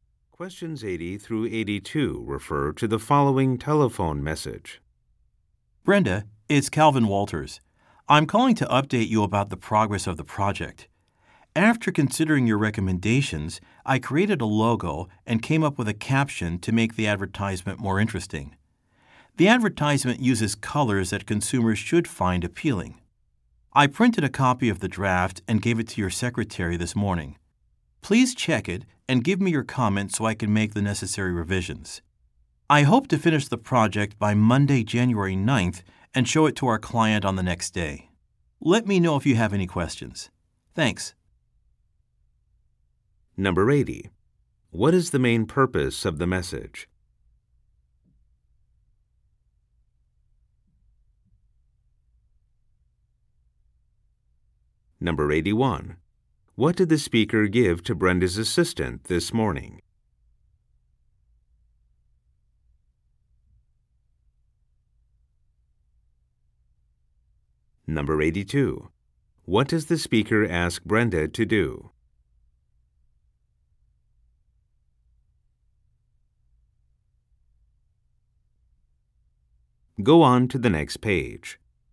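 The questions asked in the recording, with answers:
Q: What is the main purpose of the message?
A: To update Brenda on the project's progress

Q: What did the speaker give to Brenda's assistant this morning?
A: A printed copy of the advertisement draft

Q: What does the speaker ask Brenda to do?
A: Check the draft and give comments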